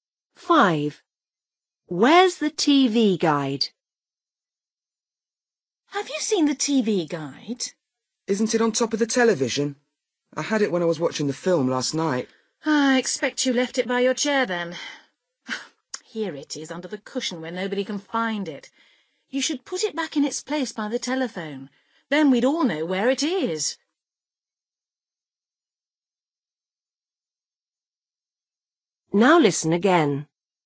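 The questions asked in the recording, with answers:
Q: Where's the TV guide?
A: under the cushion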